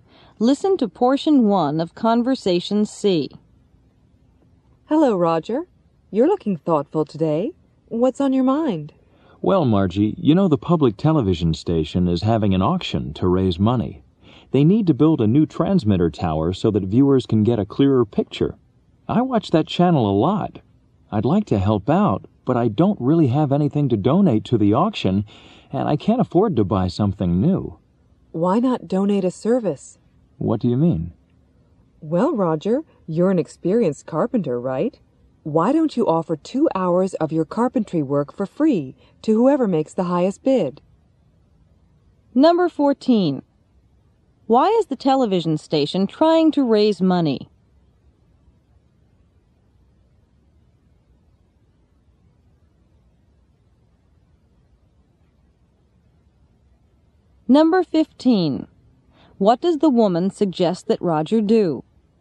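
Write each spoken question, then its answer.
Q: Why is the television station trying to raise money?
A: To build a new transmitter tower so viewers get a clearer picture

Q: What does the woman suggest that Roger do?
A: Donate 2 hours of carpentry work to the auction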